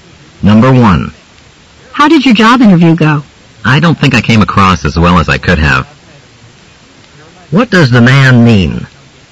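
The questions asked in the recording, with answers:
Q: What does the man mean?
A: His interview did not go as well as he had hoped.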